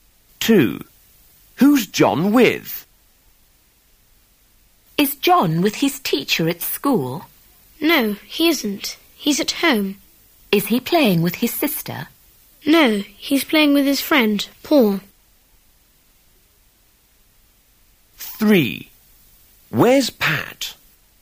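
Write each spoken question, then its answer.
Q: Who's John with?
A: His friend, Paul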